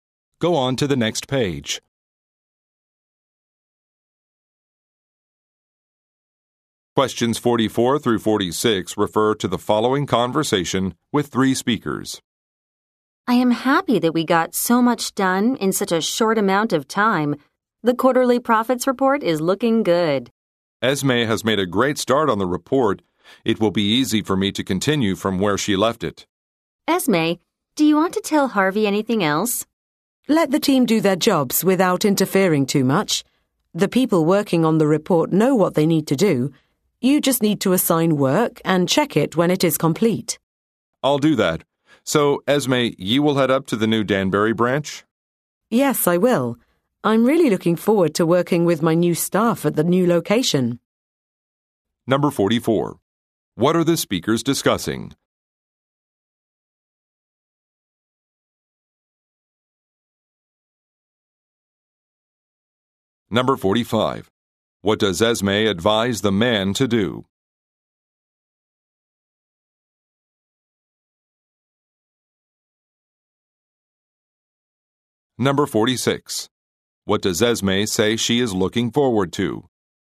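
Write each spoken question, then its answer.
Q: What are the speakers discussing?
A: The quarterly profits report

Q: What does Esme advise the man to do?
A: Let the team work without interfering too much

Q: What does Esme say she is looking forward to?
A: Working with her new staff at the new Danbury branch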